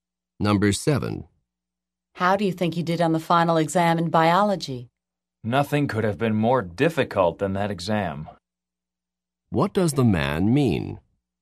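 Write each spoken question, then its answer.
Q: What does the man mean?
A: The exam was extremely difficult.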